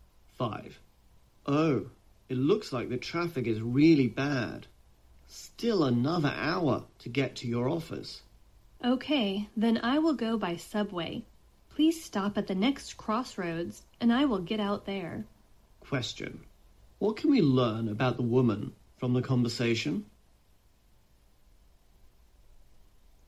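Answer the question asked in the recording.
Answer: She will get out of the car and take the subway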